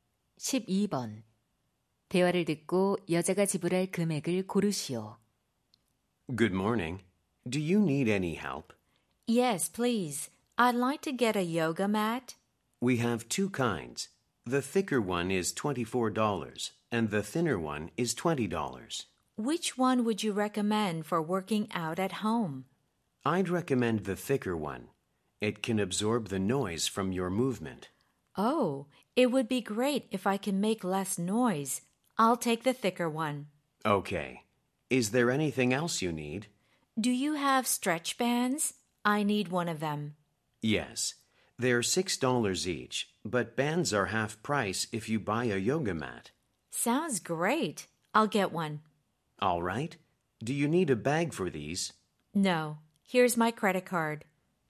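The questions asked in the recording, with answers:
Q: 대화를 듣고 여자가 지불할 금액을 고르시오.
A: $27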